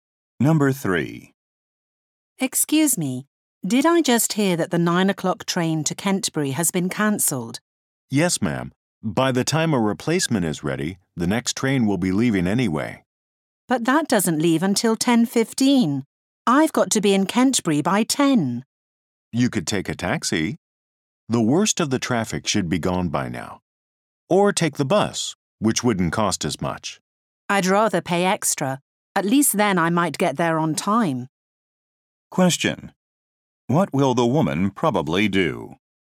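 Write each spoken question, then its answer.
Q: What will the woman probably do?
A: Take a taxi to Kentbury.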